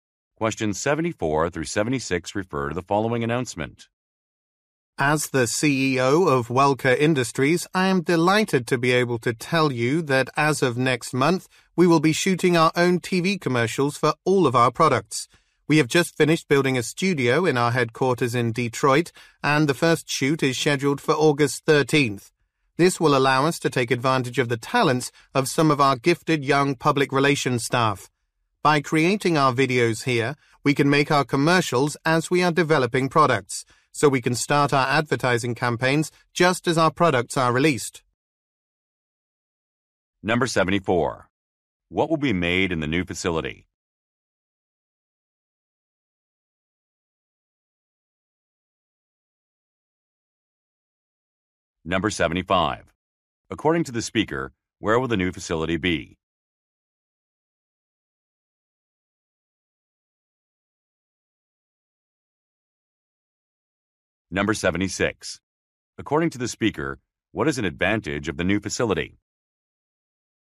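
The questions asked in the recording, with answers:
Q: What will be made in the new facility?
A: TV commercials

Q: According to the speaker, where will the new facility be?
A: In the headquarters in Detroit

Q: According to the speaker, what is an advantage of the new facility?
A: Ad campaigns can start just as products are released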